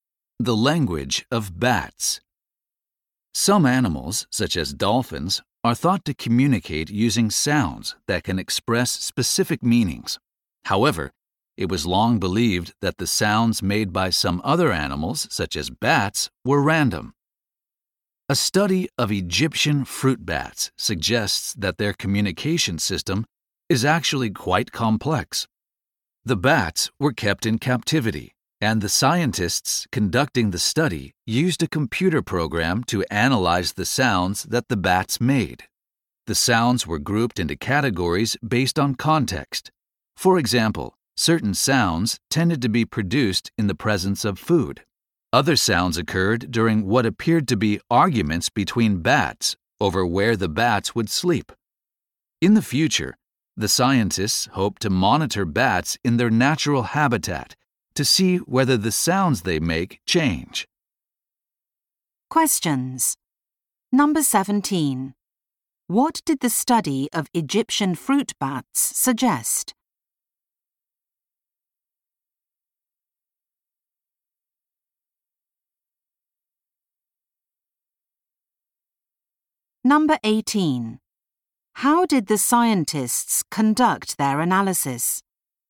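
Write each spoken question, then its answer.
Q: What did the study of Egyptian fruit bats suggest?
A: Their communication system is actually quite complex.

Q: How did the scientists conduct their analysis?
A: They used a computer program to analyze the bats' sounds and grouped them by context.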